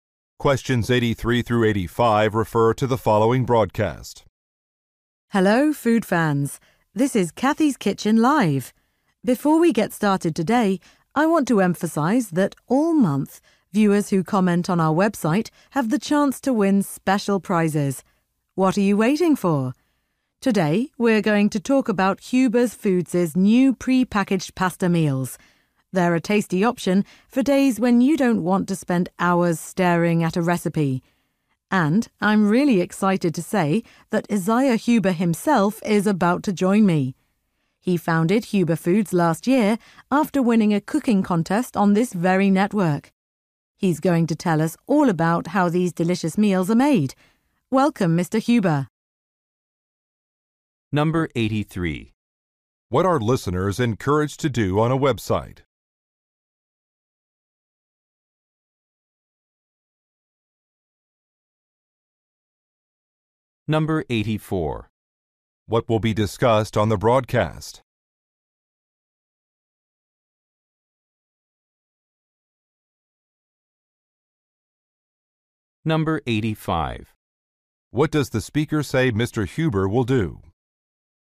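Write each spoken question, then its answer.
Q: What are listeners encouraged to do on a website?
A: Post comments to win prizes

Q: What will be discussed on the broadcast?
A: New pre-packaged pasta meals

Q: Huber will do? Questions 86 through 88 refer to the following excerpt from a workshop.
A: Explain how the meals are made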